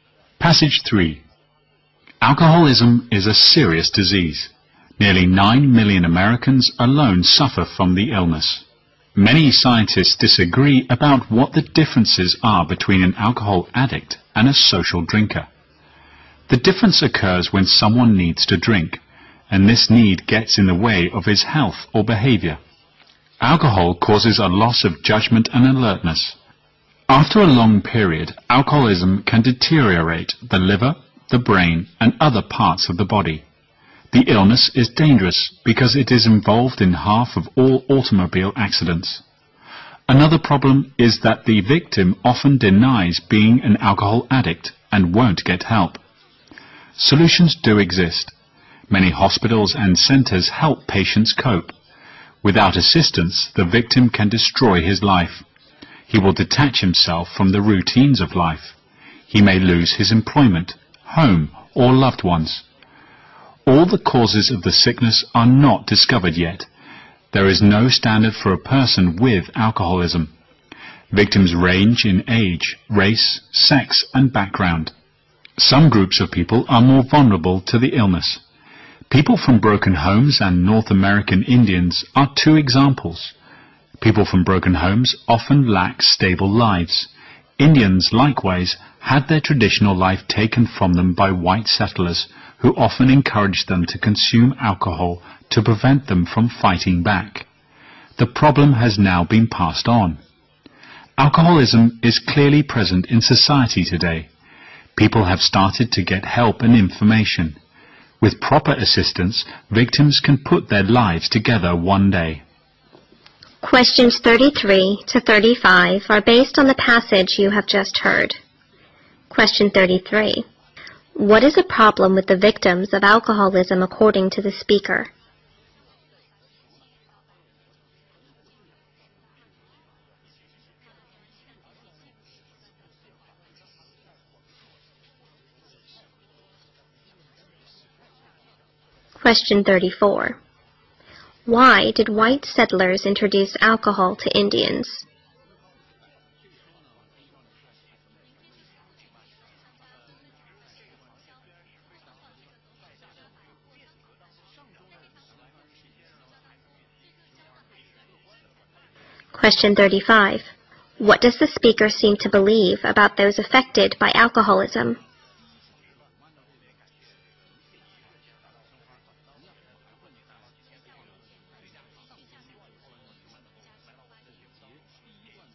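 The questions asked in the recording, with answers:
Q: What is a problem with the victims of alcoholism according to the speaker?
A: They often deny being addicts and won't get help

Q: Why did white settlers introduce alcohol to Indians?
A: To prevent them from fighting back

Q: What does the speaker seem to believe about those affected by alcoholism?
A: With proper help they can put their lives back together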